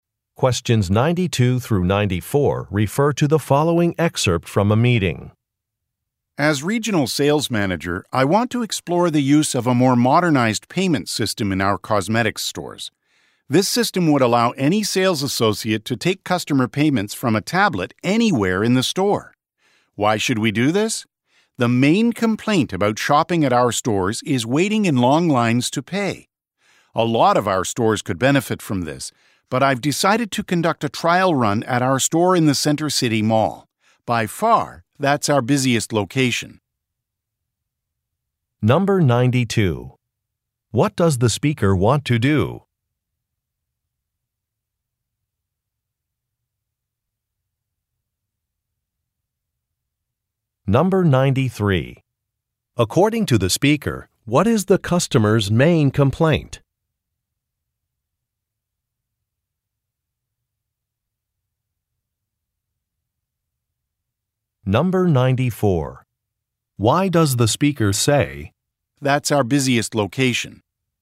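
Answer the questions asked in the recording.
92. Try out a modern payment system using tablets in the stores
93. Waiting in long lines to pay
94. To explain why the Center City Mall store was picked for the trial run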